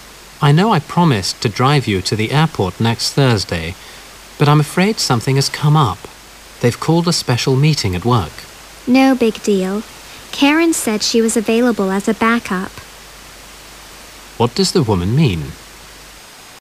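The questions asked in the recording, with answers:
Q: What does the woman mean?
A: It's not a problem; Karen can drive her to the airport instead.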